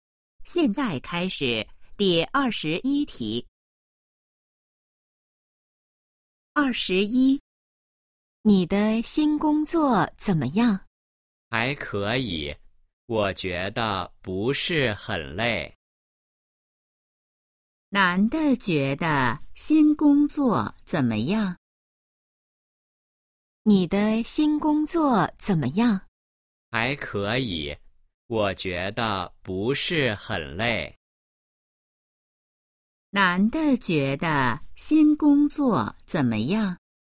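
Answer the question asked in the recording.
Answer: 还可以,不是很累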